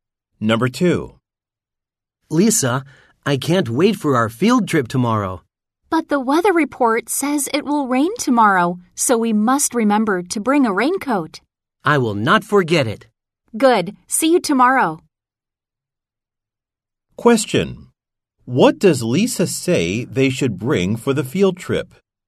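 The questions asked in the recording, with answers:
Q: What does Lisa say they should bring for the field trip?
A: A raincoat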